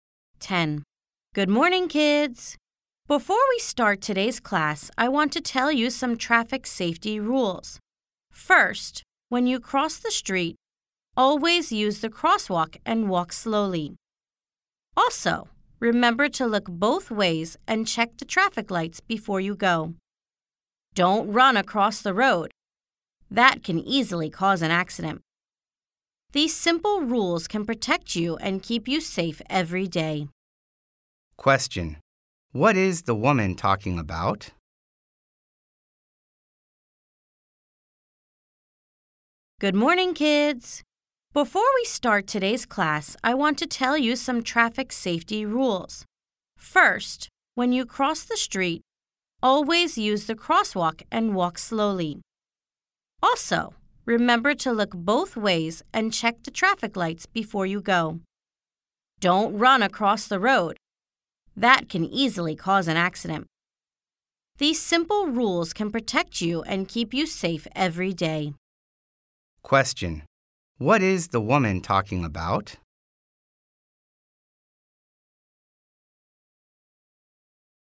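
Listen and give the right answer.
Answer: Traffic safety rules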